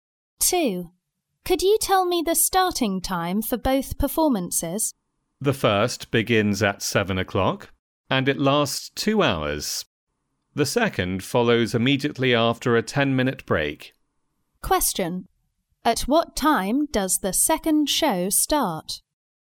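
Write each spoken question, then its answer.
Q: At what time does the second show start?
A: At 9:10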